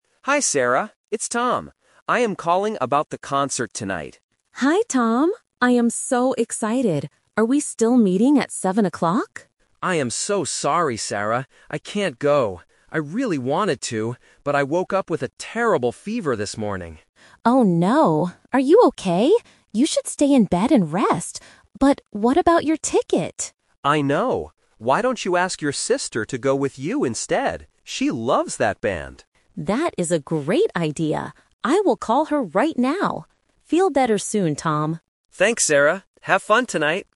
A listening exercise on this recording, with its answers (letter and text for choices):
Listen to the phone conversation and choose the correct answer (A, B, or C).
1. Why can't Tom go to the concert tonight?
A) He has to work late.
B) He has a fever.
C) He does not like the band.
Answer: B) He has a fever.

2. What does Tom suggest Sarah do?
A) Stay in bed and rest.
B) Go to the concert alone.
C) Take her sister to the concert.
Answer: C) Take her sister to the concert.

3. What is Sarah going to do next?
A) Call her sister.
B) Meet Tom at seven o'clock.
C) Buy another ticket.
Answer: A) Call her sister.

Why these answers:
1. Tom says, "I woke up with a terrible fever this morning." Option A is not mentioned. Option C is a Trap because Tom says he "really wanted to" go, and it is the sister who "loves that band."
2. Tom suggests, "Why don't you ask your sister to go with you instead?" Option A is the Trap because Sarah is the one who tells Tom to stay in bed and rest. Option B is plausible but not mentioned.
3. This is the Final Result. After Tom's suggestion, Sarah says, "I will call her right now." Option B is the Trap (meeting at seven o'clock was the original plan, but it is canceled now). Option C is not mentioned.

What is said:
Tom: Hi Sarah. It's Tom. I am calling about the concert tonight.
Sarah: Hi Tom! I am so excited. Are we still meeting at seven o'clock?
Tom: I am so sorry, Sarah. I can't go. I really wanted to, but I woke up with a terrible fever this morning.
Sarah: Oh no! Are you okay? You should stay in bed and rest. But what about your ticket?
Tom: I know. Why don't you ask your sister to go with you instead? She loves that band.
Sarah: That is a great idea. I will call her right now. Feel better soon, Tom!